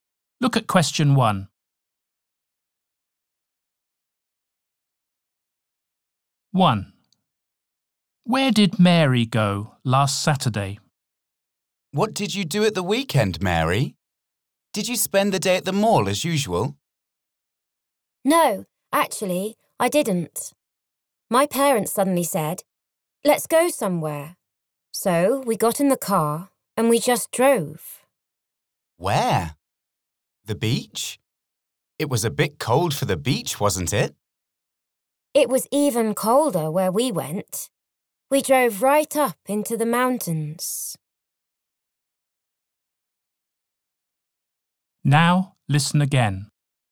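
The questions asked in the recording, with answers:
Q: Where did Mary go last Saturday?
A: To the mountains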